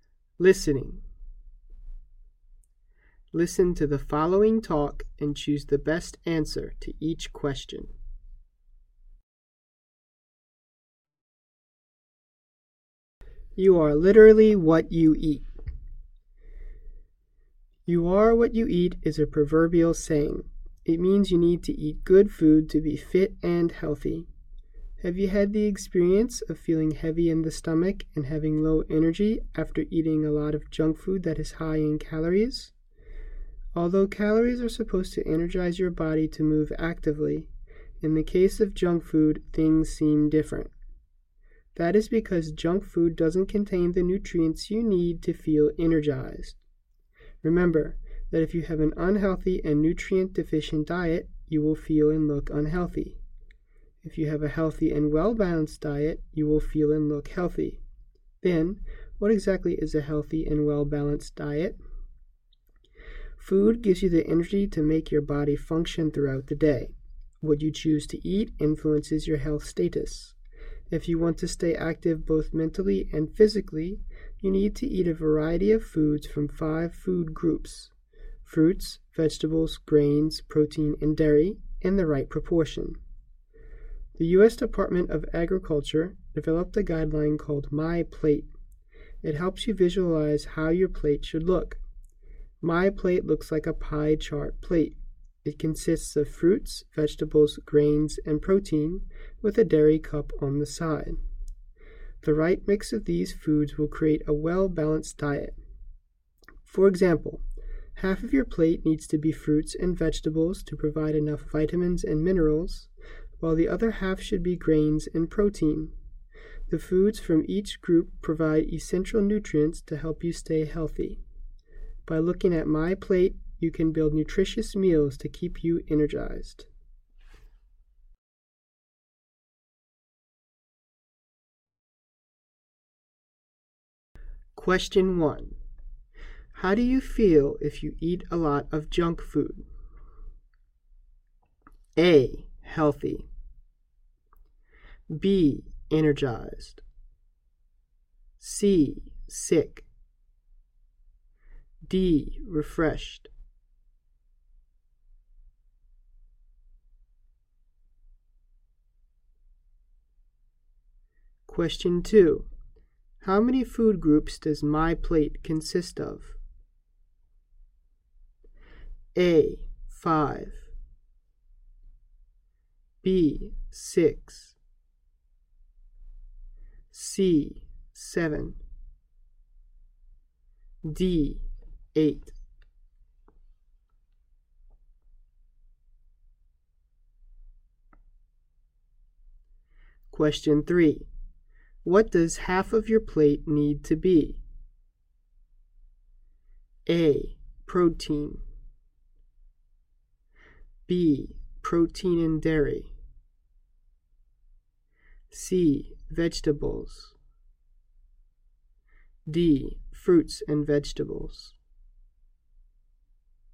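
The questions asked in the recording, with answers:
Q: How do you feel if you eat a lot of junk food?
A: C: Sick.

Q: How many food groups does My Plate consist of?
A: A: 5.

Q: What does half of your plate need to be?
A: D: Fruits and vegetables.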